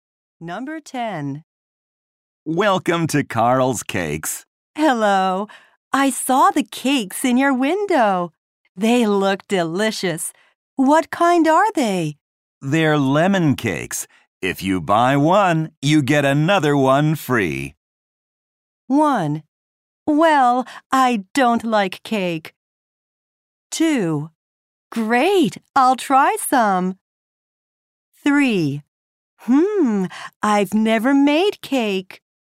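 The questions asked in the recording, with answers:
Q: They're lemon cakes. If you buy one, you get another one free.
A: 2: Great, I'll try some.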